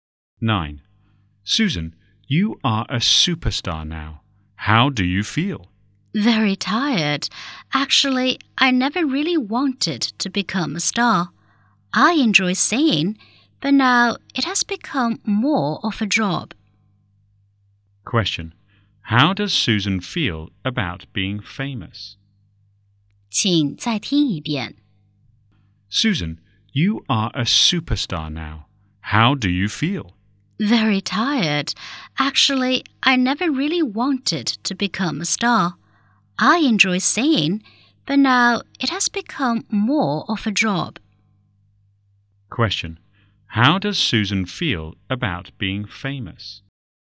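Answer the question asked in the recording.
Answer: Very tired; she never really wanted to be a star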